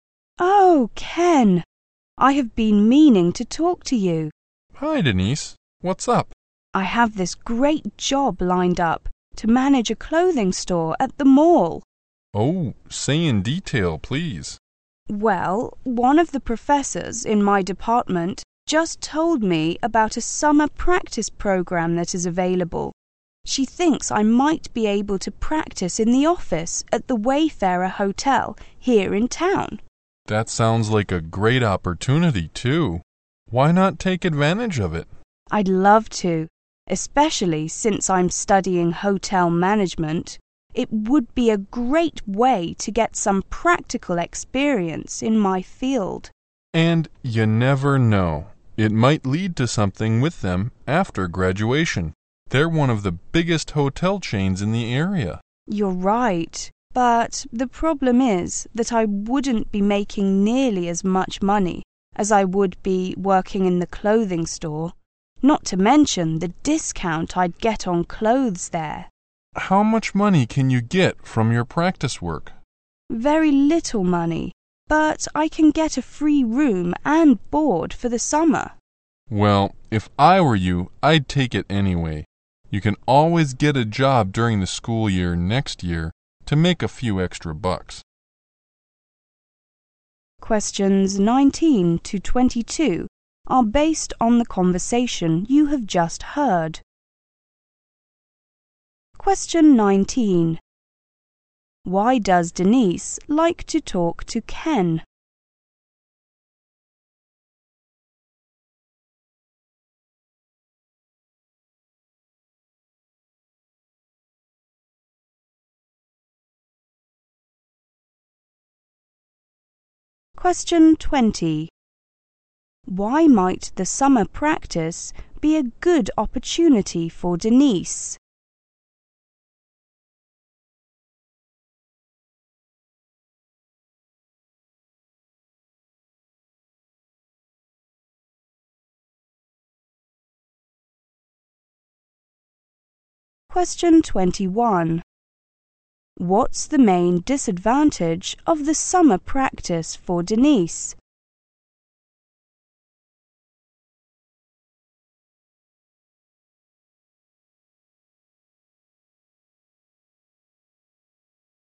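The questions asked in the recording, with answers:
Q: Why might the summer practice be a good opportunity for Denise?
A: She would get practical experience in hotel management

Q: What's the main disadvantage of the summer practice for Denise?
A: It pays very little money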